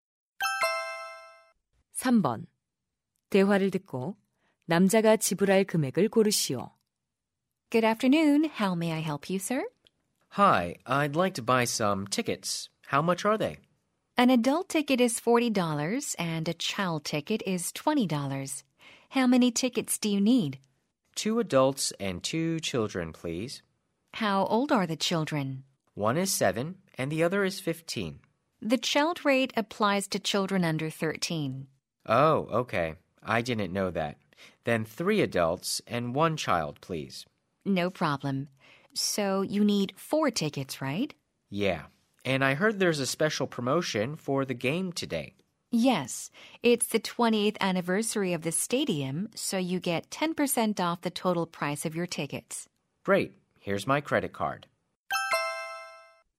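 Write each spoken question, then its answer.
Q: 대화를 듣고 남자가 지불할 금액을 고르시오.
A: 126달러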